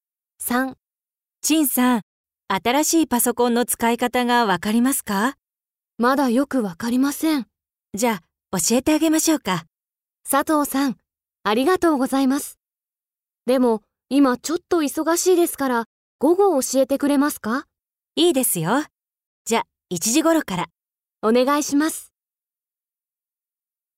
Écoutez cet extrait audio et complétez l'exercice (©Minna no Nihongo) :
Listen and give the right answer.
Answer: チンさん は さとうさん に パソコン の つかいかた を ならいます。

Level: JLPT5